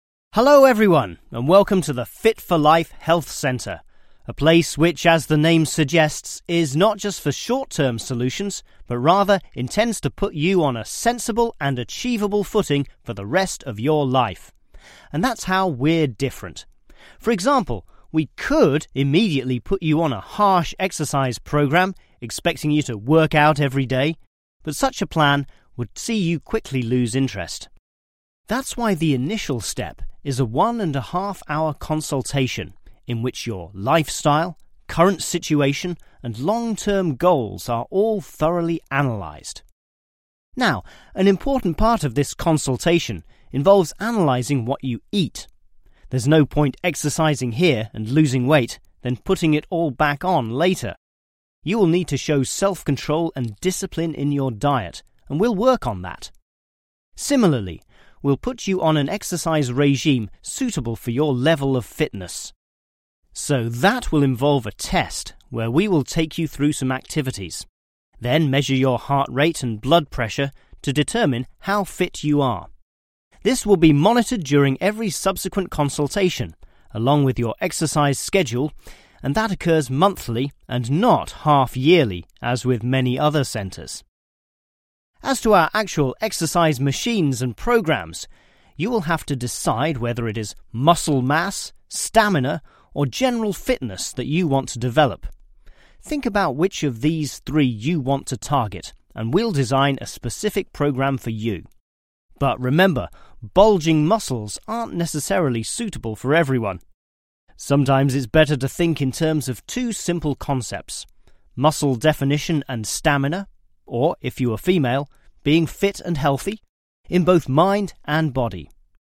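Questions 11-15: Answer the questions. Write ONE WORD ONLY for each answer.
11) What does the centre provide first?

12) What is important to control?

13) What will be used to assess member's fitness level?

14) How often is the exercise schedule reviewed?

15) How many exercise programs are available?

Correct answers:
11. consultation
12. diet
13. test
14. monthly
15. three

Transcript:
Hello everyone, and welcome to the "Fit for Life" Health Centre — a place which, as the name suggests, is not just for short-term solutions, but rather, 1 to put you on a sensible and 2 looting for the rest of your life. And that's how we're different. For example, we could 3 put you on a harsh exercise program, expeeling you to work out every day, but such a plan would see you quickly lose interest. That's why the initial step is a one-and-a-half-hour consultation, in which your lifestyle, current situation, and long-term goals, are all 4 analysed.
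Now, an important part of this 5 involves analysing what you eat. There's no point exercising here, and 6 weight, then pulling it all back on, later. You will need to show self-control and 7 in your diet, and we'll work on that. Similarly, we'll put you on an exercise 8 suitable for your level of fitness, so that will involve a test, where we will take you through some activities, then measure your heart rate and blood 9 to determine how fit you are. This will be monitored during every 10 consultation, along with your exercise schedule, and that 11 monthly, and not half-yearly, as with many other centres.
As to our actual exercise machines and programs, you will have to decide whether it is muscle mass, 12 , or general fitness, that you want to develop. Think about which of these three you want to target, and we'll design a specific program for you — but remember, bulging 13 aren't necessarily suitable for everyone. 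Sometimes it's better to think in terms of two simple concepts: muscle definition and stamina; or, if you are female, being 14 and healthy, in both mind and body.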